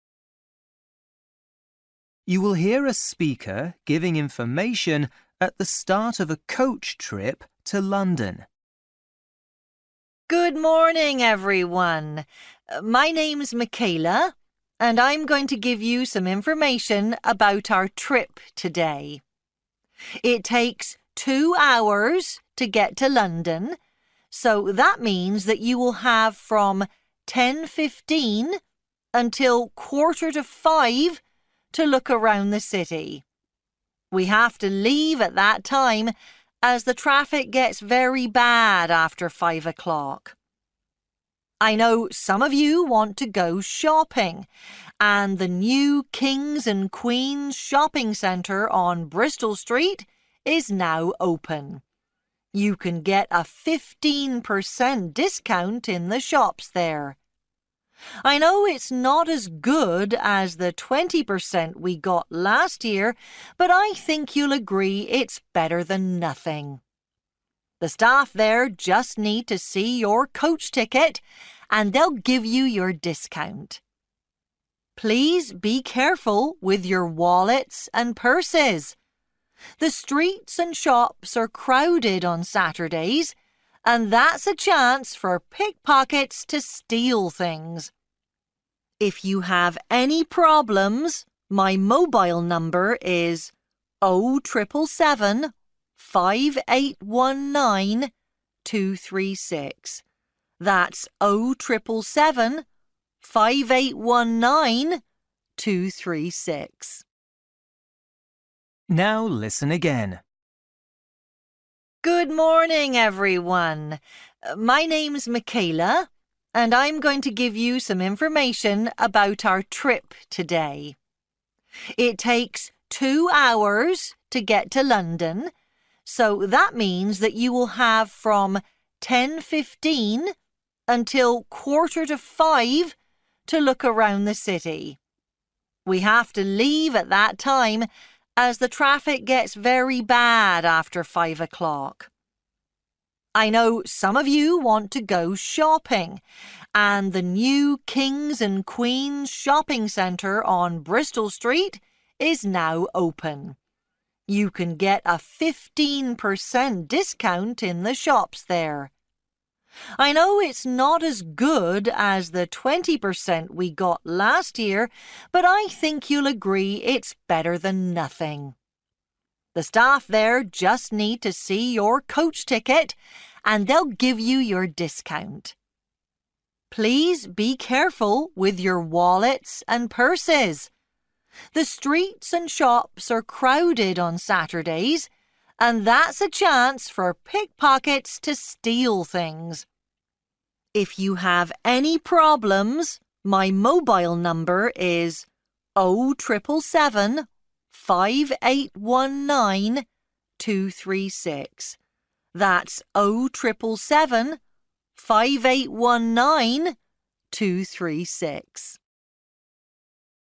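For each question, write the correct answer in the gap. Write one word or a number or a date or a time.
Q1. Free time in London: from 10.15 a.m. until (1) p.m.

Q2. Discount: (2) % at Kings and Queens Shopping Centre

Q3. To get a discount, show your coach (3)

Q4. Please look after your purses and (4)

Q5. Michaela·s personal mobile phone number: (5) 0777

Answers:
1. 4.45
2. 15
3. ticket
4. wallets
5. 5819236

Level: Luyện nghe trình độ A2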